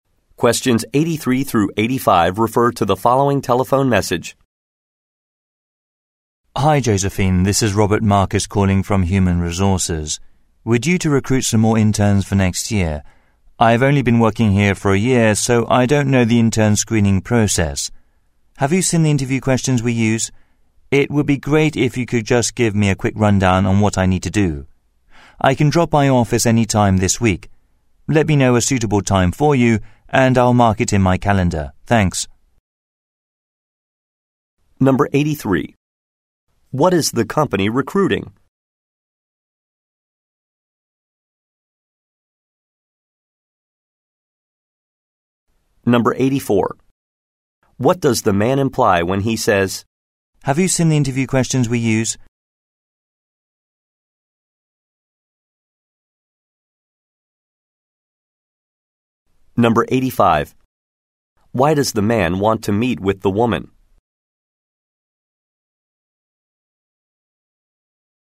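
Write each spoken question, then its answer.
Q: What is the company recruiting?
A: Interns

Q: Why does the man want to meet with the woman?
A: To learn about the intern screening process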